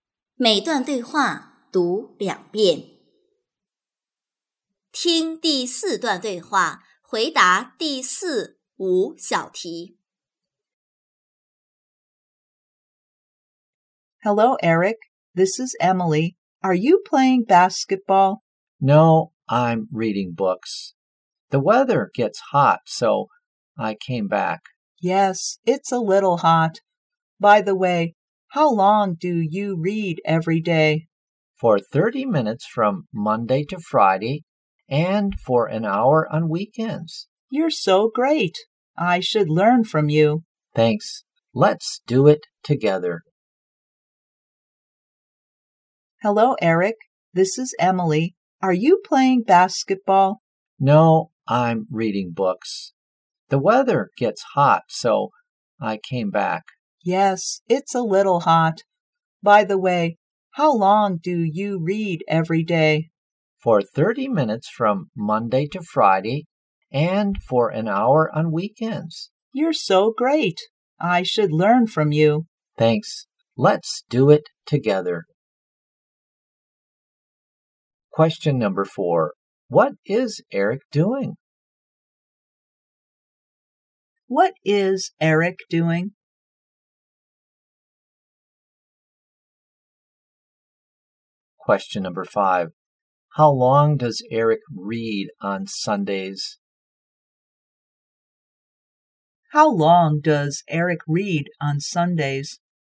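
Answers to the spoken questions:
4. Reading books
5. For an hour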